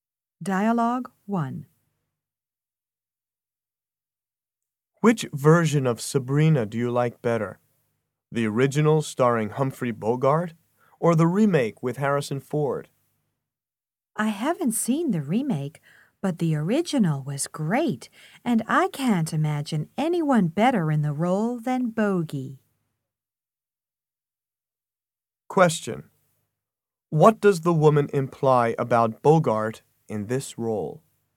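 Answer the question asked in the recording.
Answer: He was the best actor for the role.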